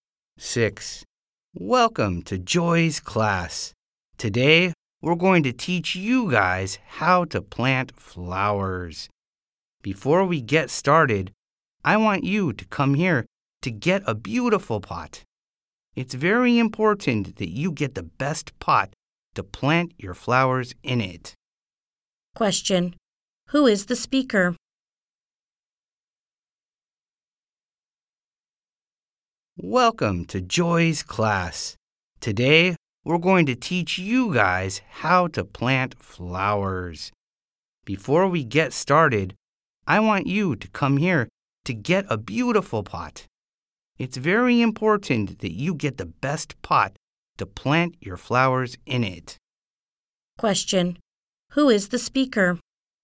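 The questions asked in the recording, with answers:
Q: Who is the speaker?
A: A teacher of a flower-planting class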